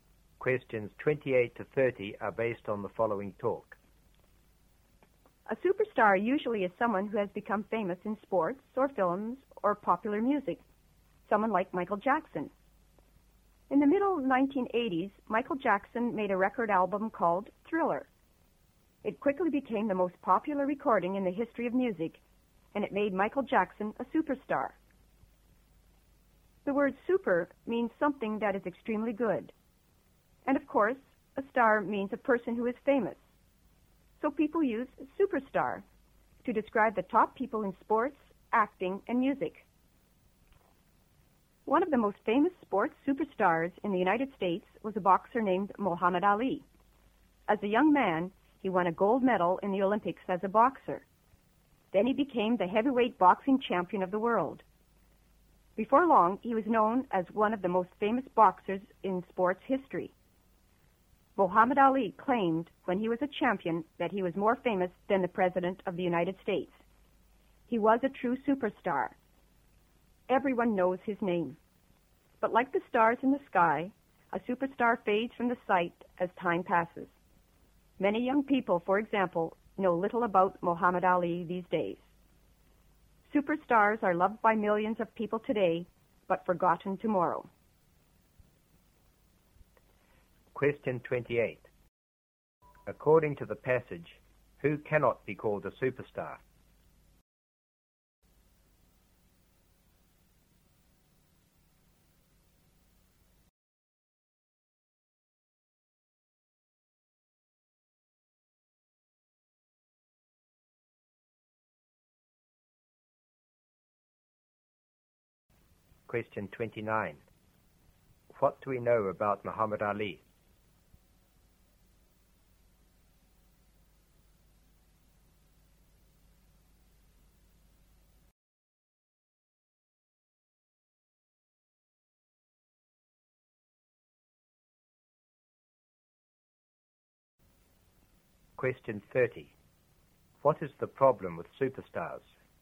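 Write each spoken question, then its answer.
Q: What do we know about Muhammad Ali?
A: He was a famous boxer, an Olympic gold medalist and world heavyweight champion

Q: What is the problem with superstars?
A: They are forgotten as time passes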